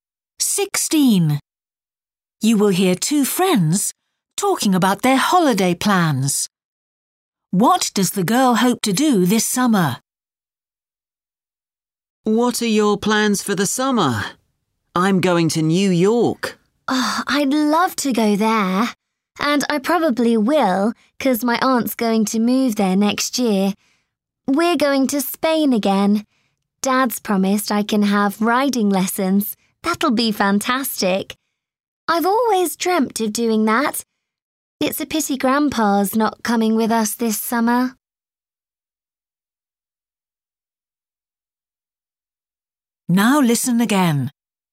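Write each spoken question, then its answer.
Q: What does the girl hope to do this summer?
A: Have riding lessons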